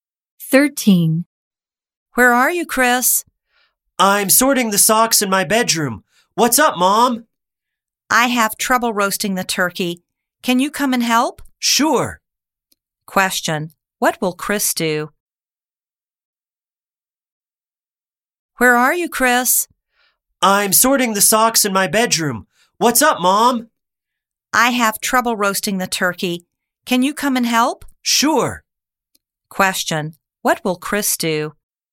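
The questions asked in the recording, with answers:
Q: What will Chris do?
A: Help his mom roast the turkey.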